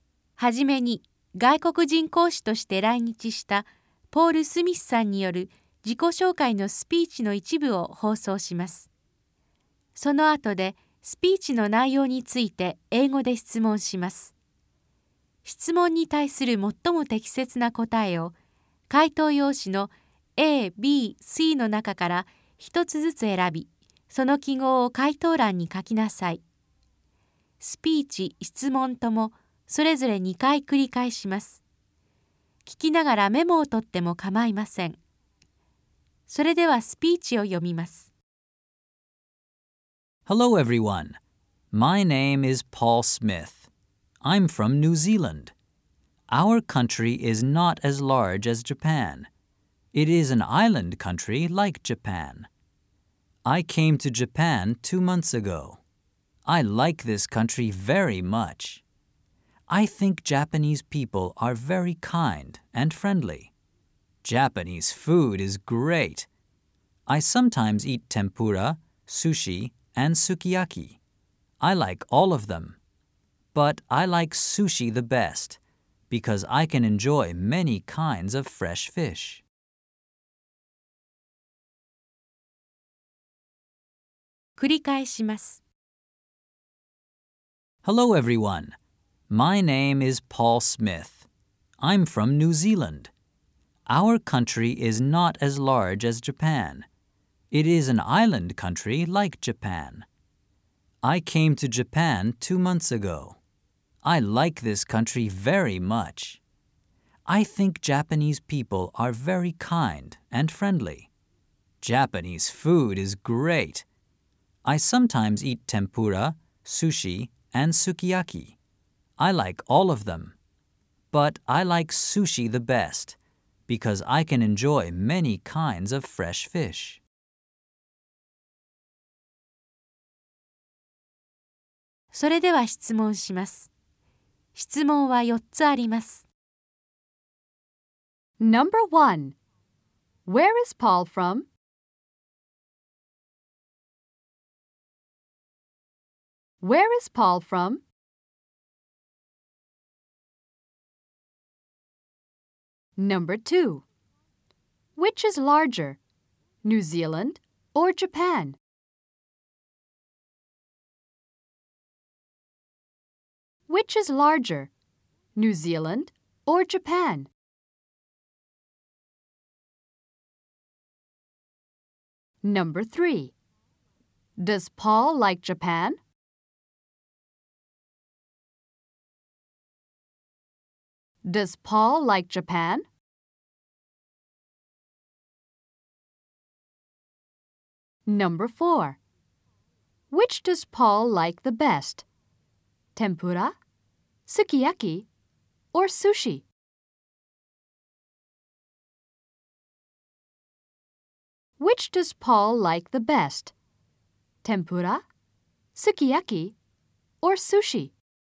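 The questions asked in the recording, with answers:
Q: Where is Paul from?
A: New Zealand

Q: Which is larger, New Zealand or Japan?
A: Japan

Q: Does Paul like Japan?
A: Yes, he does.

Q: Which does Paul like the best?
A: Sushi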